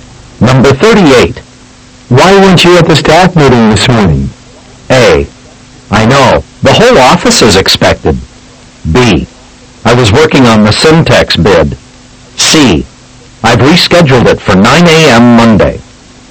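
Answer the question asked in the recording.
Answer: B: I was working on the Syntex bid.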